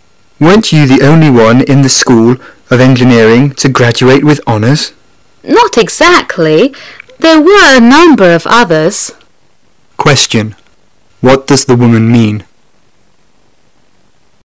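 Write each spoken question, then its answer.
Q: What does the woman mean?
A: Others also graduated with honours.

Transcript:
[解析] Man: Weren't you the only one in the School of Engineering to graduate with honors? Woman: Not exactly. There were a number of others. Question: What does the woman mean?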